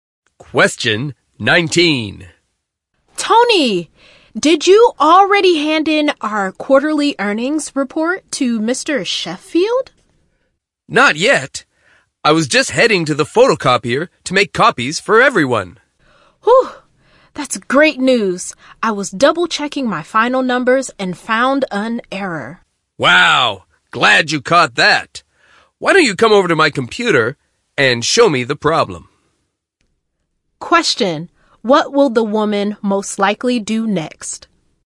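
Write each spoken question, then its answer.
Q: What will the woman most likely do next?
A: Show the man the error in the report on his computer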